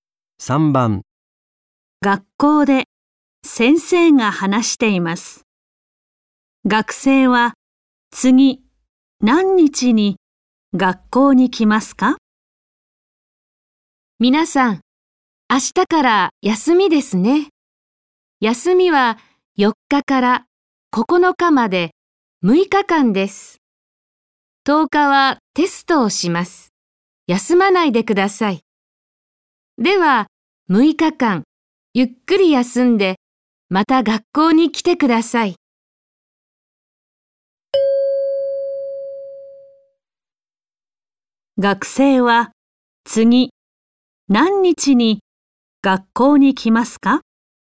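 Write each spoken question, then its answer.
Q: 学生は、次、何日に学校に来ますか?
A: 10日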